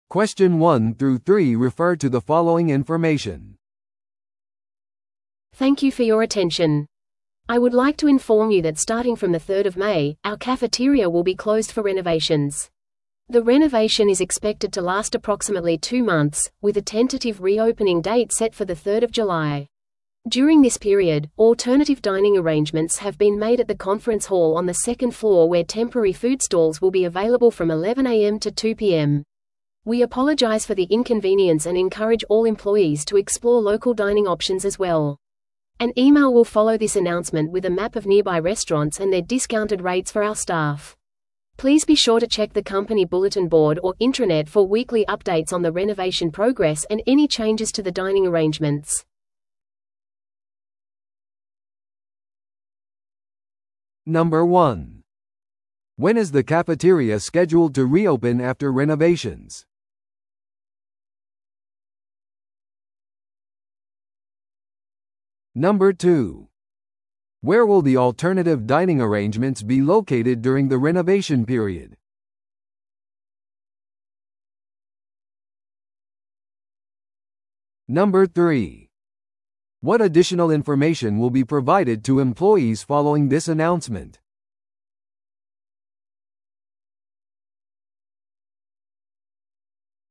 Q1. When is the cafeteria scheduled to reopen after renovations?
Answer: 7月3日

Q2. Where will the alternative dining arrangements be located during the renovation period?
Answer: 2階の会議ホール

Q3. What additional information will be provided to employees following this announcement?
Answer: 割引のある近隣のレストランの地図

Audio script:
Thank you for your attention. I would like to inform you that starting from the 3rd of May, our cafeteria will be closed for renovations. The renovation is expected to last approximately two months, with a tentative reopening date set for the 3rd of July. During this period, alternative dining arrangements have been made at the conference hall on the second floor where temporary food stalls will be available from 11am to 2pm. We apologize for the inconvenience and encourage all employees to explore local dining options as well. An email will follow this announcement with a map of nearby restaurants and their discounted rates for our staff. Please be sure to check the company bulletin board or intranet for weekly updates on the renovation progress and any changes to the dining arrangements.